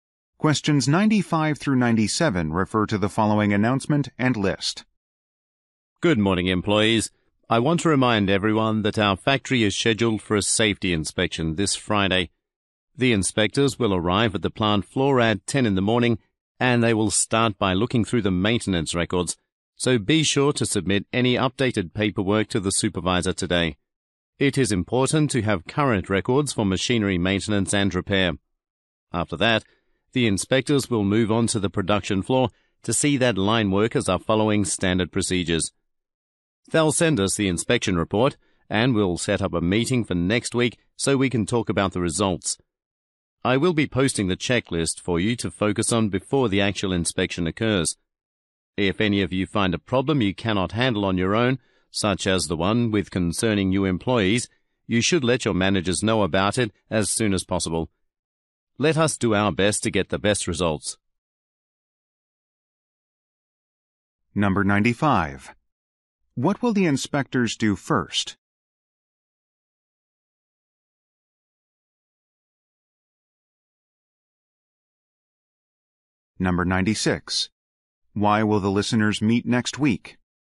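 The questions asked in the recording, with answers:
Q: What will the inspectors do first?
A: Look through maintenance records

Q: Why will the listeners meet next week?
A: To discuss the inspection results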